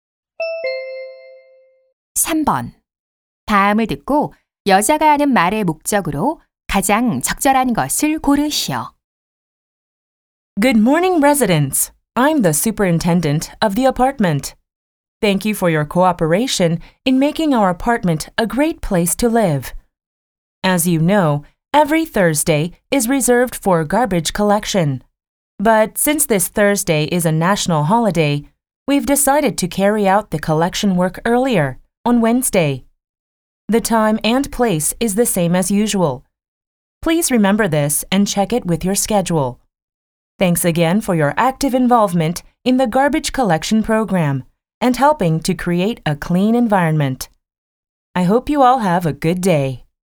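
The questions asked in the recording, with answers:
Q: 다음을 듣고 여자가 하는 말의 목적으로 가장 적절한 것을 고르시오.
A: 이번 주 쓰레기 수거일이 목요일에서 수요일로 변경됨을 알리려고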